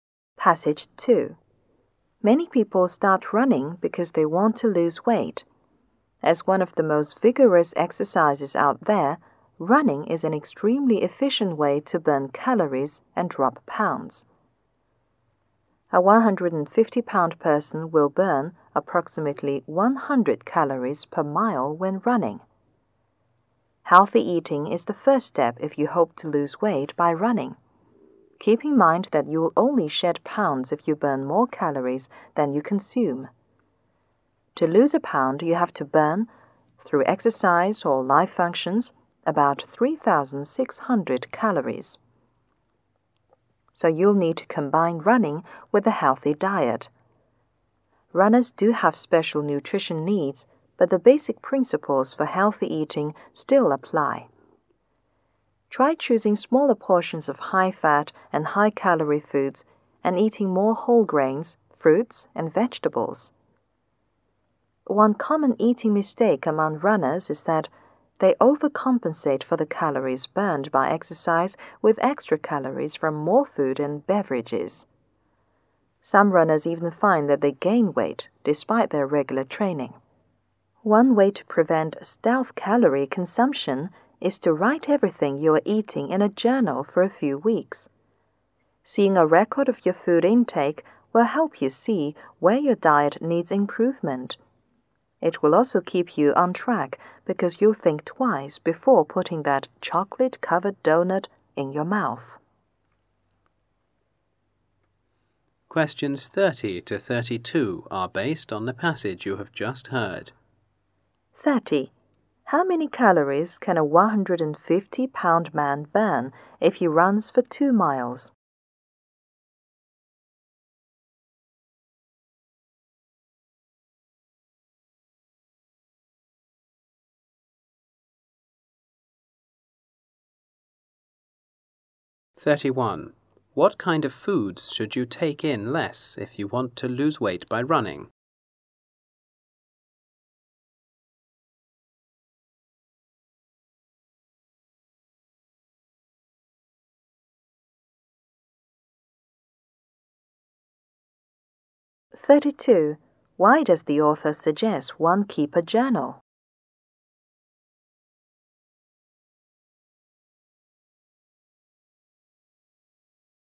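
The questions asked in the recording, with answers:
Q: How many calories can a 150-pound man burn if he runs for 2 miles?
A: About 200 calories

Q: What kind of foods should you take in less if you want to lose weight by running?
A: High-fat and high-calorie foods

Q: Why does the author suggest one keep a journal?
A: To see where the diet needs improvement and to stay on track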